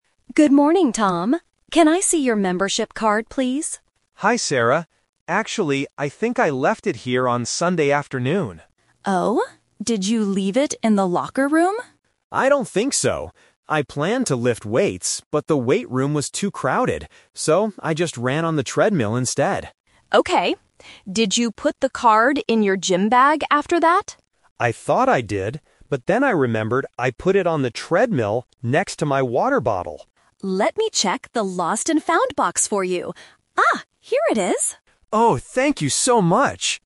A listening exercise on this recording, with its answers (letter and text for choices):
Listen to the conversation between a gym member and a receptionist. Then, circle the correct answer for each question.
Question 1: What did Tom do at the gym on Sunday afternoon?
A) He lifted weights.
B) He ran on the treadmill.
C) He cleaned his gym bag.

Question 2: Why didn't Tom lift weights?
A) Because the room was too crowded.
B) Because he was very tired.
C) Because he didn't have his membership card.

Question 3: Where did Tom leave his membership card?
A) In the locker room.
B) In his gym bag.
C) On the treadmill.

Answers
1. B) He ran on the treadmill.
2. A) Because the room was too crowded.
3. C) On the treadmill.

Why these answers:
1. Tom says, "So, I just ran on the treadmill instead." Option (A) is the trap (The Twist); he planned to lift weights, but he didn't. Option (C) is never mentioned.
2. Tom explains his reason clearly: "I planned to lift weights, but the weight room was too crowded." Options (B) and (C) are plausible real-life reasons but are not mentioned in the audio.
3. Tom finally remembers: "But then I remembered I put it on the treadmill..." Option (A) is a trap; the receptionist asks if he left it in the locker room, but he says "I don't think so." Option (B) is also a trap; he thought he put it in his gym bag, but he was wrong.

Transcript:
Receptionist: Good morning, Tom. Can I see your membership card, please?
Tom: Hi, Sarah. Actually, I think I left it here on Sunday afternoon.
Receptionist: Oh? Did you leave it in the locker room?
Tom: I don't think so. I planned to lift weights, but the weight room was too crowded. So, I just ran on the treadmill instead.
Receptionist: Okay. Did you put the card in your gym bag after that?
Tom: I thought I did. But then I remembered I put it on the treadmill, next to my water bottle.
Receptionist: Let me check the lost and found box for you. Ah, here it is!